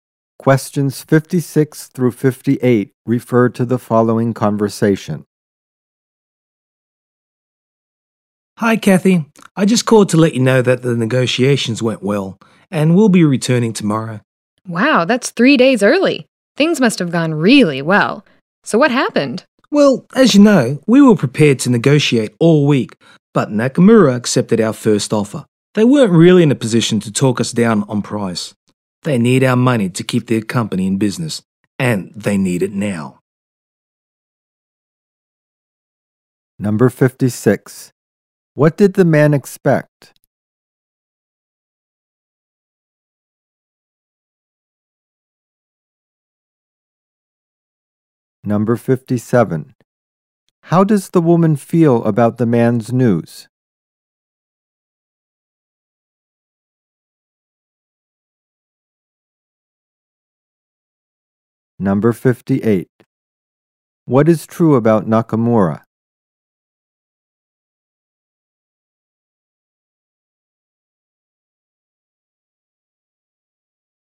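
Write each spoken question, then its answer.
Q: What did the man expect?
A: To negotiate all week

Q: What is true about Nakamura?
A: It needs money to stay in business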